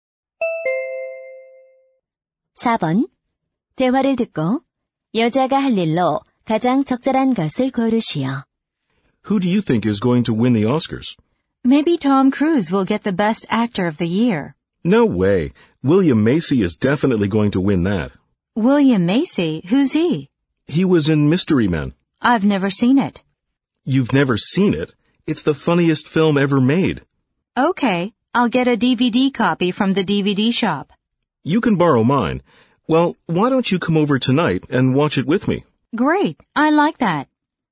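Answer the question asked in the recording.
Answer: 남자의 집에 가서 영화 DVD 보기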